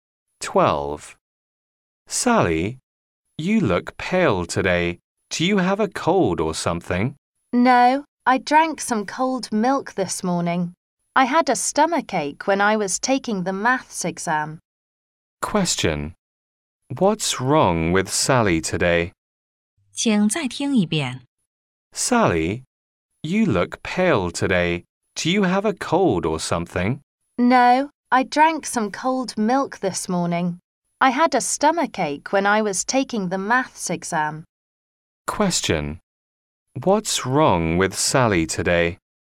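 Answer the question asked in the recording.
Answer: She has a stomach ache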